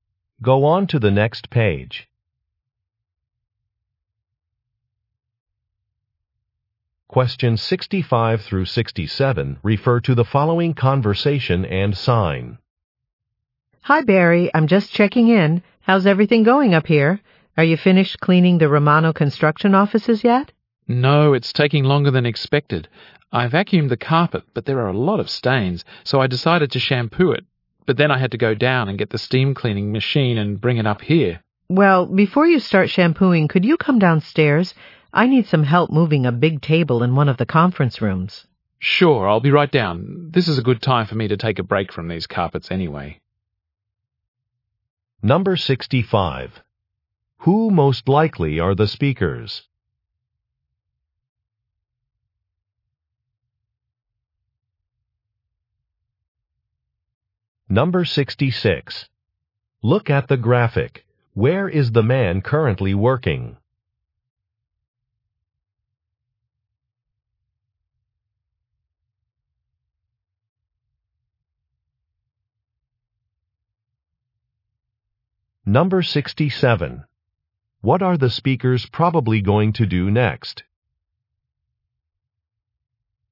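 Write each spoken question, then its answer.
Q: Who most likely are the speakers?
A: Cleaning staff

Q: What are the speakers probably going to do next?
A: Move a table in a conference room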